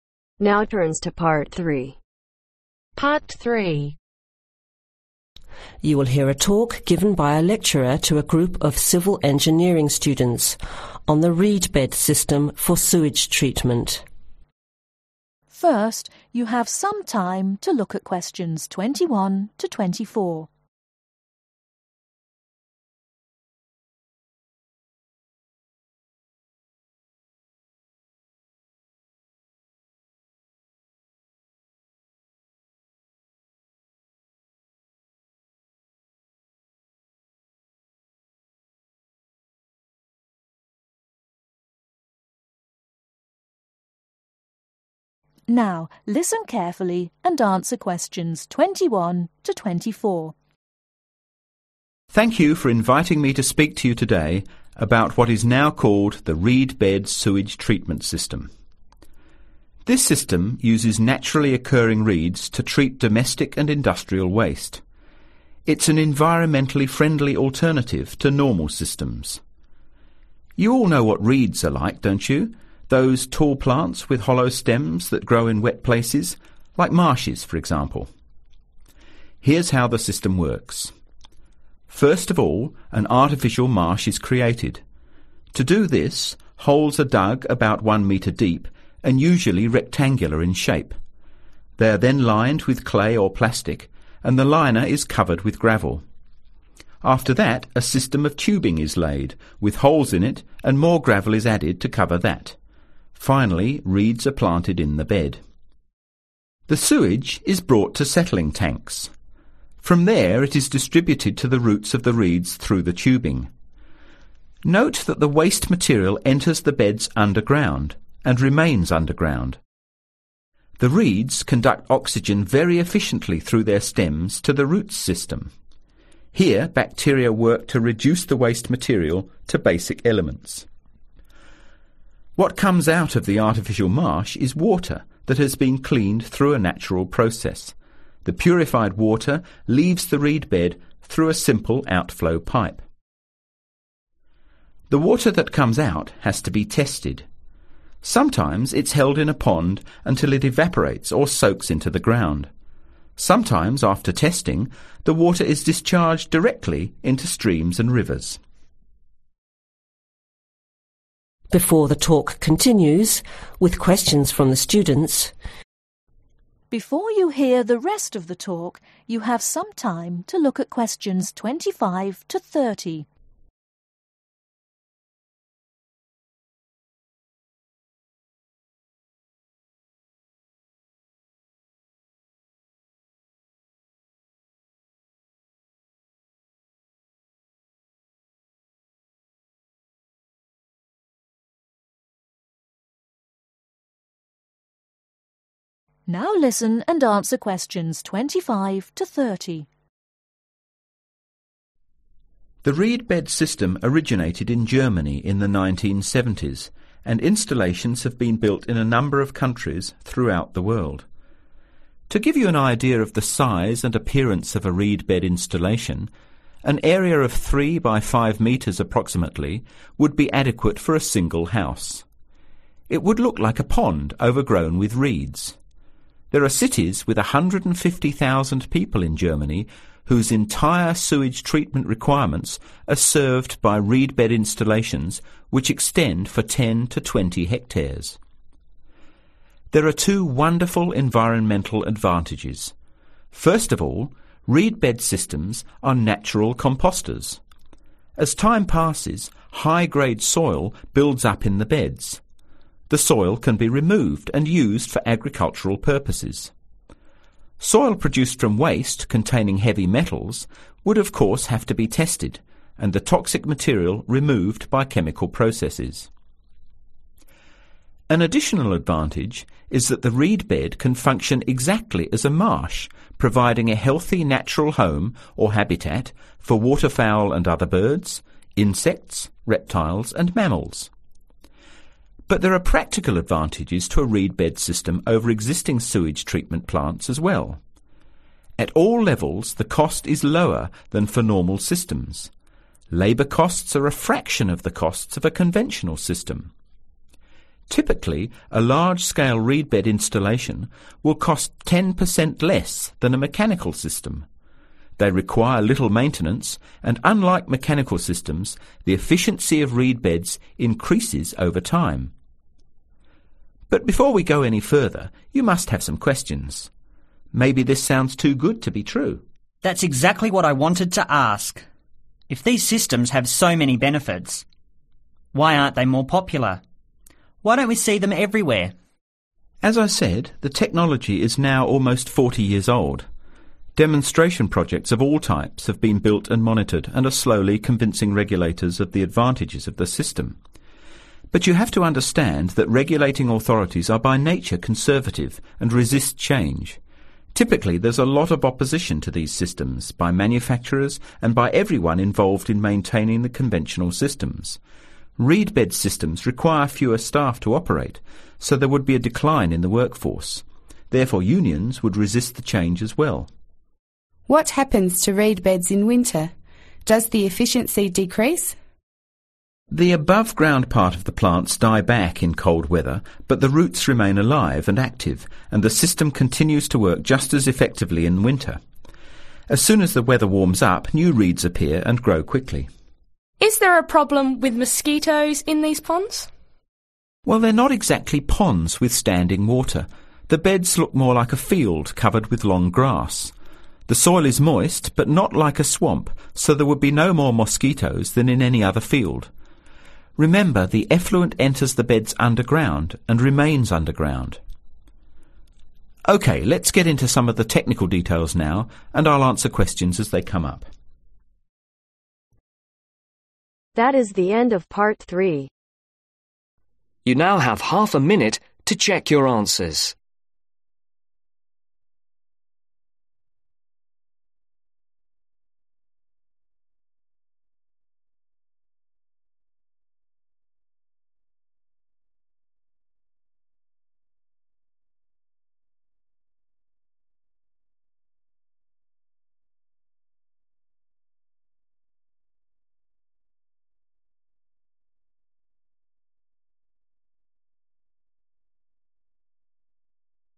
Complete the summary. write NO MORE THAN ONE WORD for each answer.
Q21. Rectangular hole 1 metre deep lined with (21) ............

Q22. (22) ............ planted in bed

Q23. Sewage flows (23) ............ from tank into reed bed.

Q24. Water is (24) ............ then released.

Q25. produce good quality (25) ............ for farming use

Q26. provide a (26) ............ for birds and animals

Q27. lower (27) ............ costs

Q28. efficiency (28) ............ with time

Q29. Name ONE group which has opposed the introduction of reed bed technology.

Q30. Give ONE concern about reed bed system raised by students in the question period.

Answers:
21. clay/plastic
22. reeds
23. underground
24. tested
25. compost/soil
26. (healthy/natural) home/habitat
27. labour/labor
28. increases
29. unions/manufacturers
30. efficiency/winter/cold weather/mosquitoes